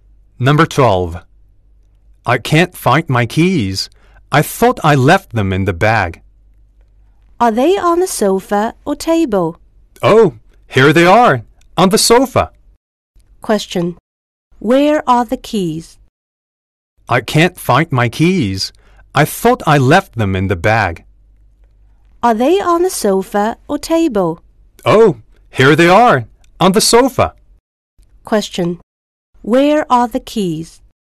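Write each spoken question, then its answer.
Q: Where are the keys?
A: On the sofa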